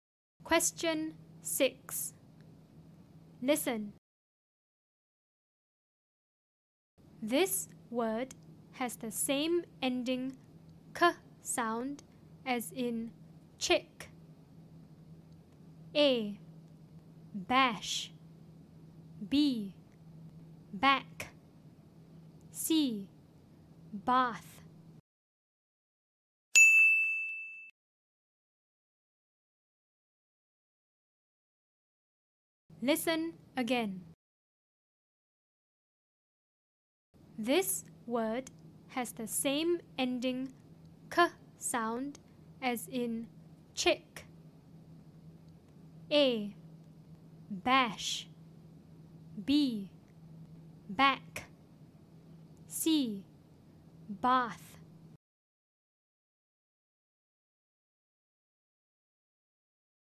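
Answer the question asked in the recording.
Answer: B: Back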